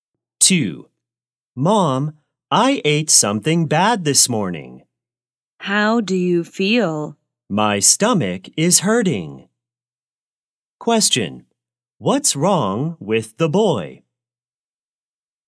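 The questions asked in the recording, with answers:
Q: What's wrong with the boy?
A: He has a stomachache.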